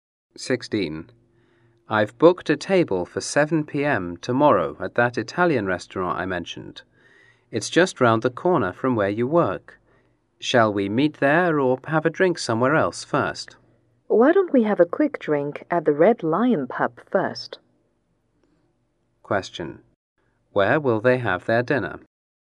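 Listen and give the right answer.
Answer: At an Italian restaurant.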